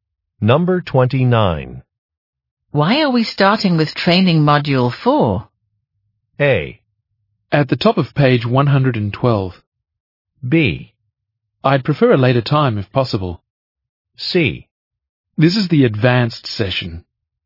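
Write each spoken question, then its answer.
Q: Why are we starting with training module 4?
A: C: This is the advanced session.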